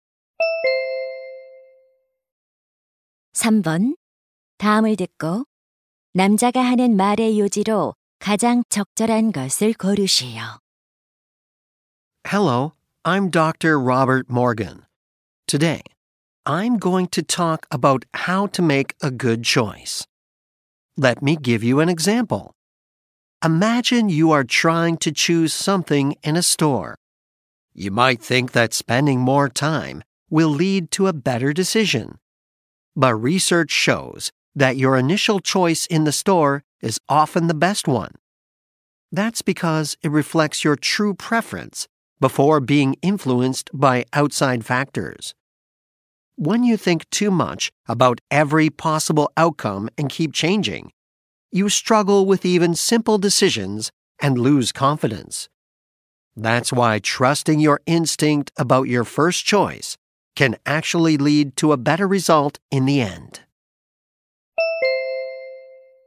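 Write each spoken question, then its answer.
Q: 남자가 하는 말의 요지로 가장 적절한 것을 고르시오.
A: 처음 선택에 대한 직감을 믿는 것이 더 나은 결과로 이어진다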